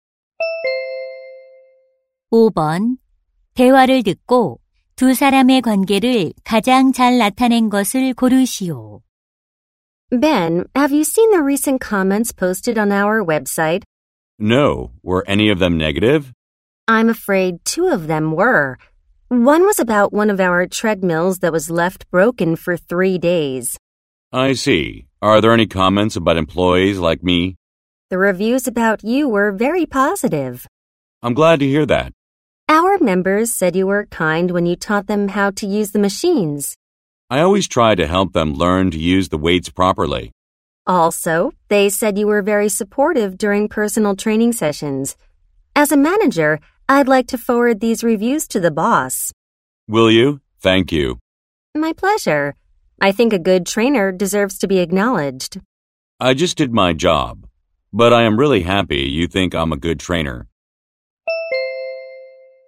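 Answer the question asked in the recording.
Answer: 헬스장 매니저 - 트레이너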